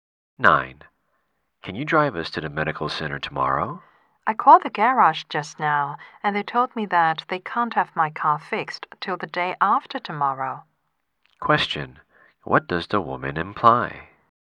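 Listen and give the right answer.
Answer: She can't drive them tomorrow because her car is being repaired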